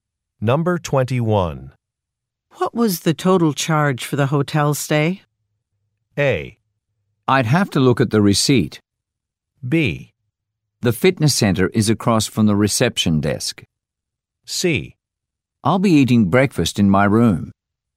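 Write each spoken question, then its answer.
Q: What was the total charge for the hotel stay?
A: A: I'd have to look at the receipt.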